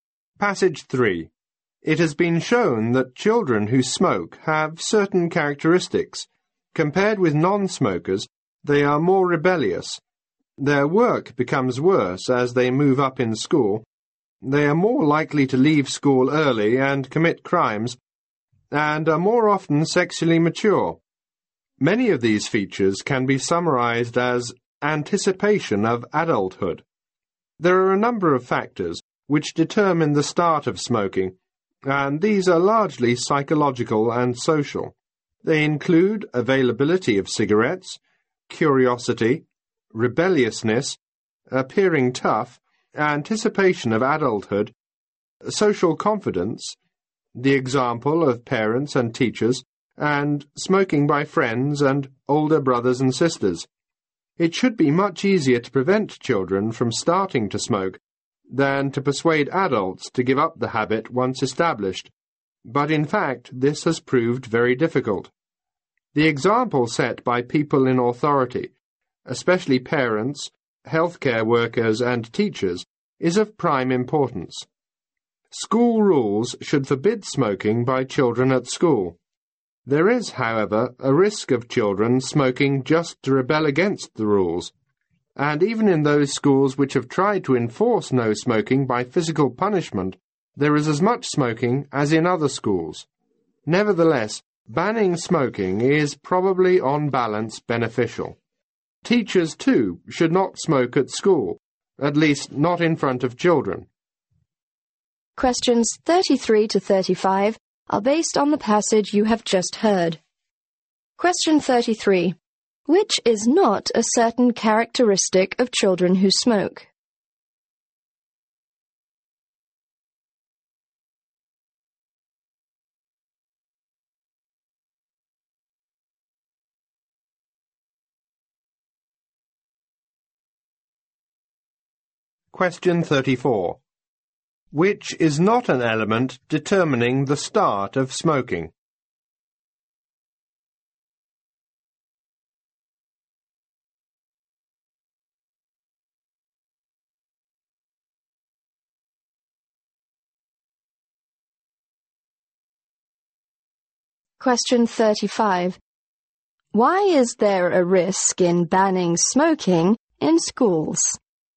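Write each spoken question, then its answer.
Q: Why is there a risk in banning smoking in schools?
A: Children may smoke just to rebel against the rules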